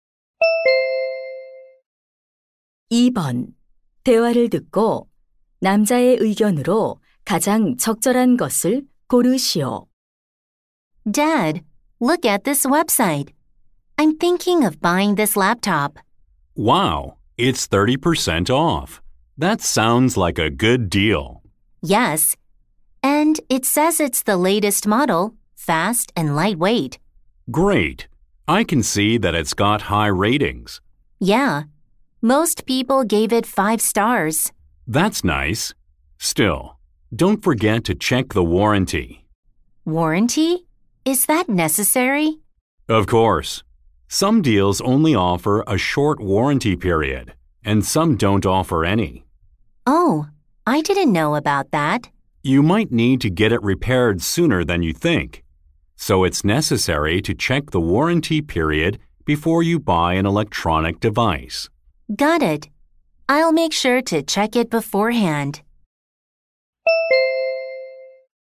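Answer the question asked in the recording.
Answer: 전자기기를 사기 전에 보증 기간을 확인해야 한다.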